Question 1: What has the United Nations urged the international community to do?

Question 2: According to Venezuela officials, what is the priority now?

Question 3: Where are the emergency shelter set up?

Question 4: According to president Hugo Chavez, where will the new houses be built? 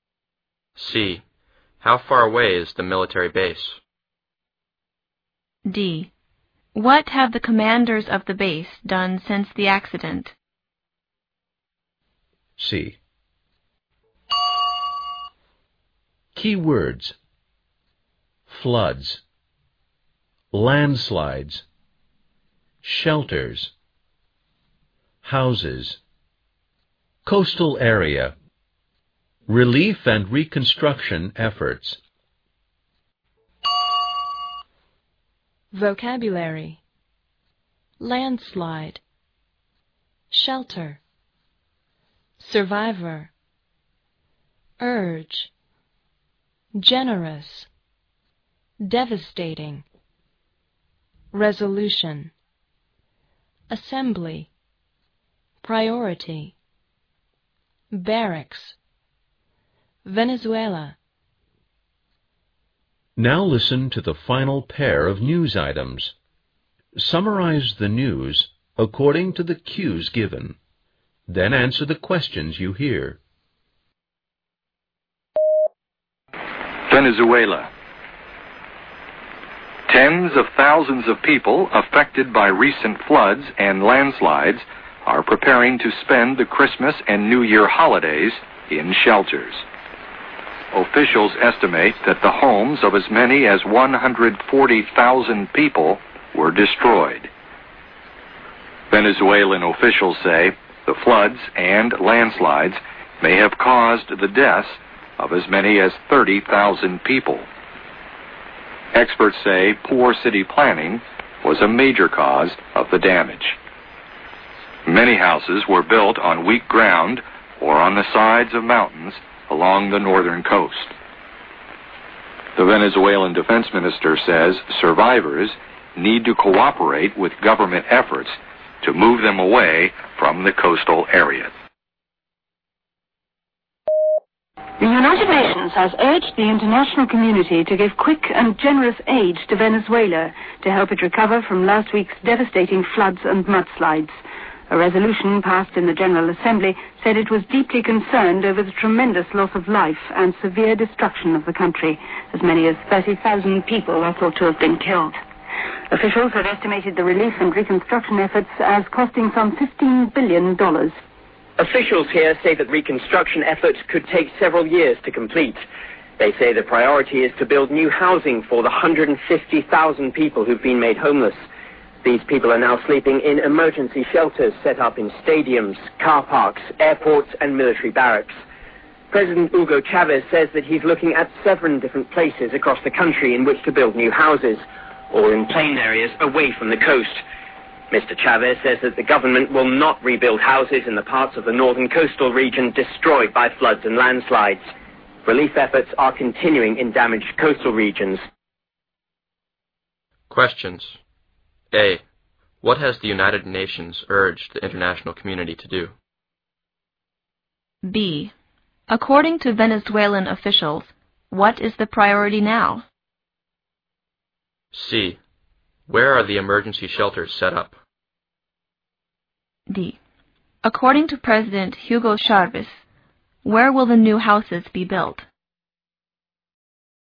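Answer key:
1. Give quick and generous aid to Venezuela to help it recover.
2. To build new housing for the 150,000 people made homeless.
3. In stadiums, car parks, airports and military barracks.
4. In seven places across the country, in plain areas away from the coast.

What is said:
An operator was rescued unhurt from a second car left dangling in the air after the accident.
The plane returned to its base 60 kilometers away, the crew unaware of the accident.
Commanders of the base have since started an investigation and suspended all low-level missions in Italy until further notice.
Questions. A. What is the cause of the disaster?
B. How many people have been killed?
C. How far away is the military base?
D. What have the commanders of the base done since the accident?
Keywords. floods, landslides, shelters, houses, coastal area, relief and reconstruction efforts.
Vocabulary. landslide, shelter, survive, urge, generous, devastating, resolution, assembly, priority, barracks, Venezuela.
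Now listen to the final pair of news items, summarize the news according to the cues given, then answer the questions you hear.
Venezuela: Tens of thousands of people are affected by recent floods and landslides are preparing to spend the Christmas and New Year holidays in shelters.
Officials estimated that the homes of as many as 140,000 people were destroyed.
Venezuela official say the floods and landslides may have caused the death of as many as 30,000 people.
Experts say poor city planning was a major cause of the damage.
Many houses were built on weak ground or on the sides of mountains along the northern coast.
The Venezuela Defence Minister says survivors need to cooperate with government effort to move them away from the coastal area.
The United Nations has urged the international community to give quick and generous aid to Venezuela to help it recover from last week's devastating floods and mudslides.
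A resolution passed in the general assembly said it was deeply concerned over tremendous loss of live and serve destruction of the country.
Officials have estimated the relief and reconstruction efforts as costing some 50 billion dollars.
Officials here say that reconstruction efforts could take several years to complete.
They say the priority is to build new housing for the 150,000 people who'd been made homeless.
These people are now sleeping in an emergency shelters set up in stadium, car parks, airports and military barracks.
President Hugo Chavez says that he is looking at several different places across the country in which to build new houses, all in plain areas away from the coast.
Mr Chavez says that the government will not rebuild houses in the parts of northern coastal regions destroyed by floods and landslide.
Relief efforts are continuing in damaged coastal regions.
Questions.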